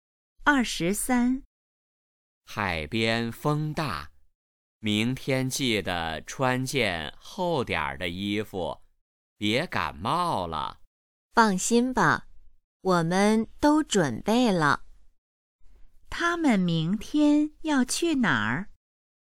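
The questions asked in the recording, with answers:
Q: 他们明天要去哪儿?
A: 海边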